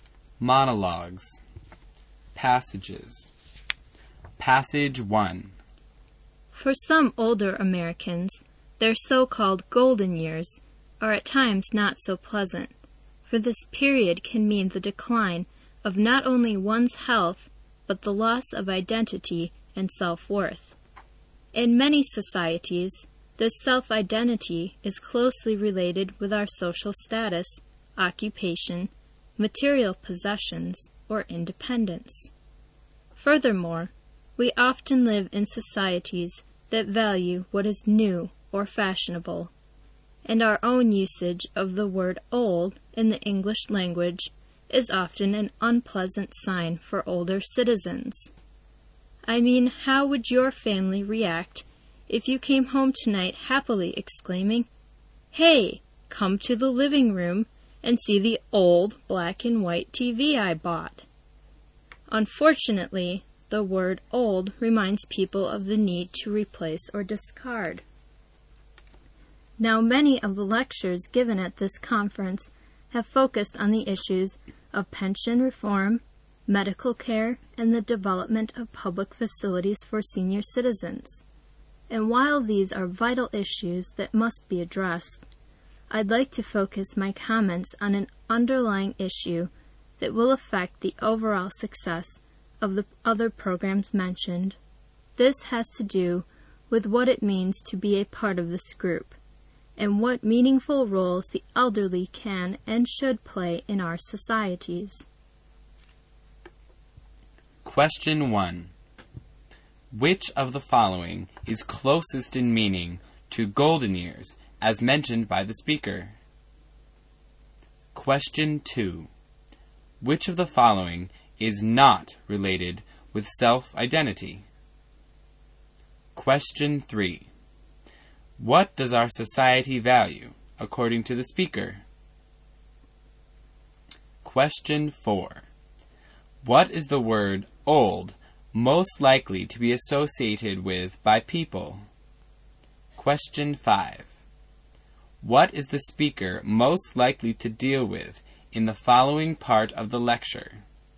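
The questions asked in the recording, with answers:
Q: Which of the following is closest in meaning to golden years, as mentioned by the speaker?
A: old age; the later years of life

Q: What does our society value, according to the speaker?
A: what is new or fashionable

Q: What is the word old most likely to be associated with by people?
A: the need to replace or discard

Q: What is the speaker most likely to deal with in the following part of the lecture?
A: what it means to be elderly and what meaningful roles the elderly can play in society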